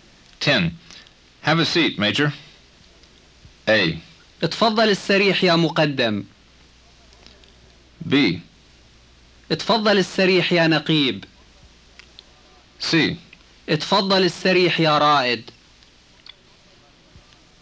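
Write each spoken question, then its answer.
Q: Have a seat, Major.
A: C: اتفضل السريح يا رائد.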